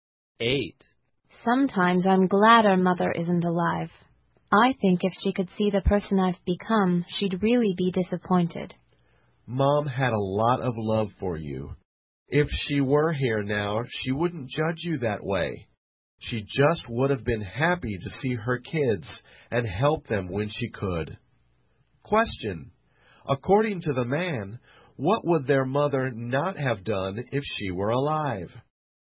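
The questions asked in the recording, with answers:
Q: According to the man, what would their mother not have done if she were alive?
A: Judge the woman or be disappointed in her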